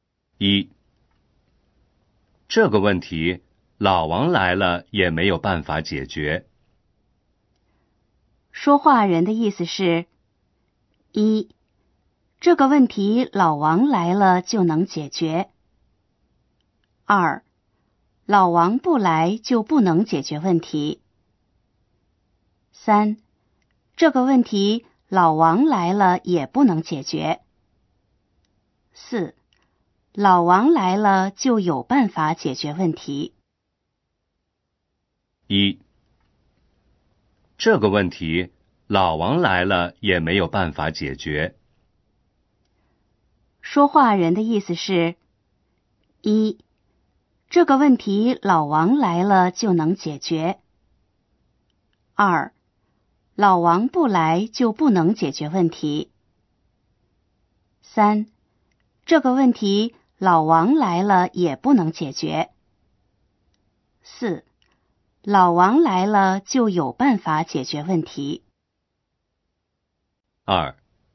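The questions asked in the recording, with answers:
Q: 说话人的意思是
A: 3: 这个问题老王来了也不能解决。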